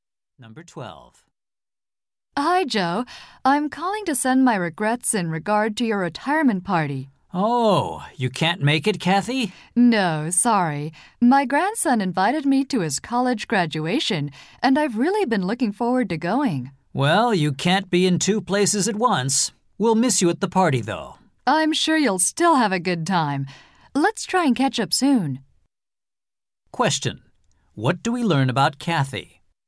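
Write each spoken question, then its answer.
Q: What do we learn about Kathy?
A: She will miss Joe's retirement party to attend her grandson's graduation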